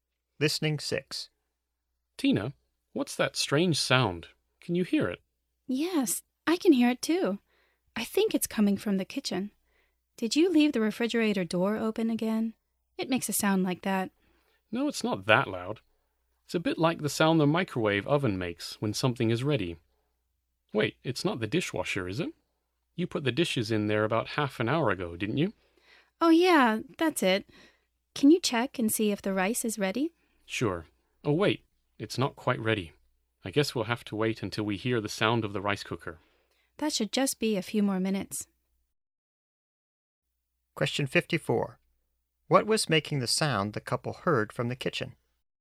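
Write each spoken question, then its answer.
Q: What was making the sound the couple heard from the kitchen?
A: The dishwasher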